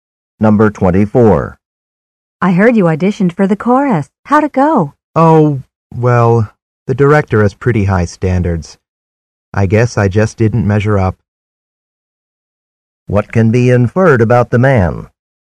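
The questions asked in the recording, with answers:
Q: What can be inferred about the man?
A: He wasn't chosen for the chorus.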